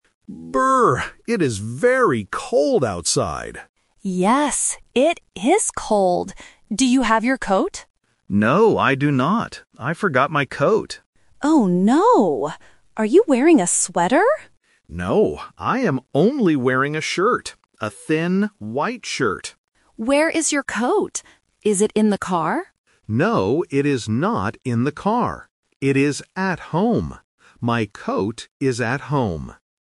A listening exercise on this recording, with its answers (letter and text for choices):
Listen to the conversation between two friends outside a building. Choose the correct answer (A, B, or C) for each question.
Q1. How is the weather outside?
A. It is hot.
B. It is raining.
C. It is cold.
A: C. It is cold.

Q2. What is the man wearing right now?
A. A coat.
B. A sweater.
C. A shirt.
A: C. A shirt.

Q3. Where is the man's coat?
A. In the car.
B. At home.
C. At the office.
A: B. At home.

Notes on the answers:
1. David says in the very first sentence, "It is very cold outside!" and Lisa repeats it. Options A and B are not mentioned in the audio.
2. David says, "I am only wearing a shirt." Option A (A coat) is the item he forgot. Option B (A sweater) is the trap because Lisa asks, "Are you wearing a sweater?", but David answers "No."
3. David explicitly states, "It is at home" and spells the word: "H-O-M-E." Option A (In the car) is the trap because Lisa asks if it is in the car, but David says "No, it is not in the car." Option C is not mentioned.

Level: A1